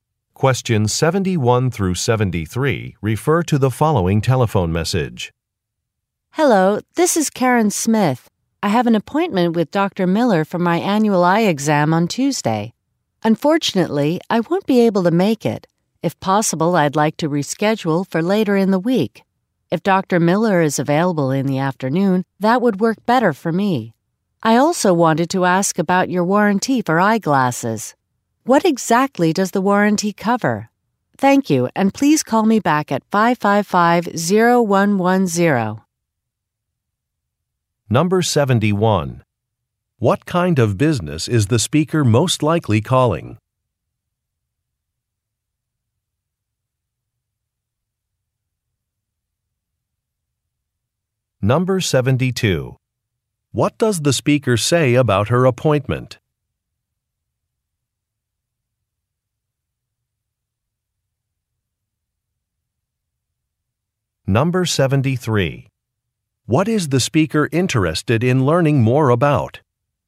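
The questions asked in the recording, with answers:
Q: What kind of business is the speaker most likely calling?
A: An eye doctor's office

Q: What does the speaker say about her appointment?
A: She needs to reschedule it

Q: What is the speaker interested in learning more about?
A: The eyeglasses warranty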